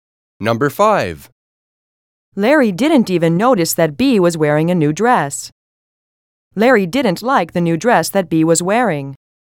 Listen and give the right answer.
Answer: Different is the correct answer.